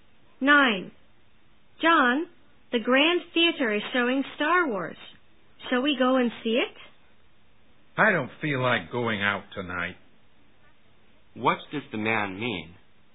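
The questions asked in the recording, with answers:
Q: What does the man mean?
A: He doesn't want to go to the film tonight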